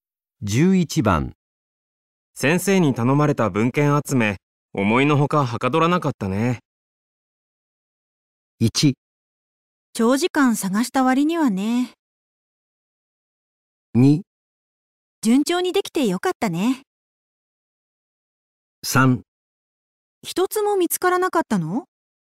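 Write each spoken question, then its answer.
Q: 先生に頼まれた文献集め、思いのほかはかどらなかったね。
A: 1: 長時間探した割にはね。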